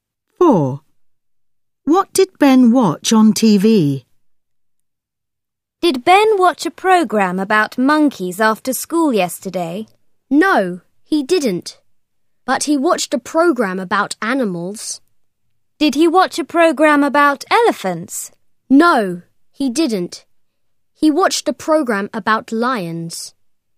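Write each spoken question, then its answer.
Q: What did Ben watch on TV?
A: a program about lions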